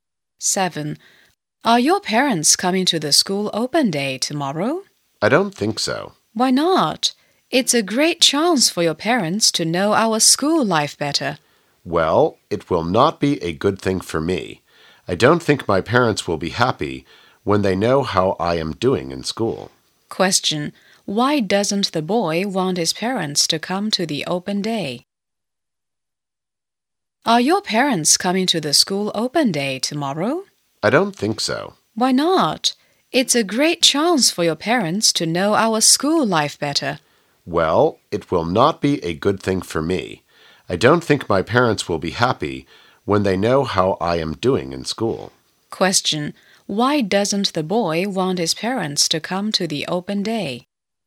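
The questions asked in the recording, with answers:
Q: Question. Why doesn't the boy want his parents to come to the open day?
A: He isn't doing well in school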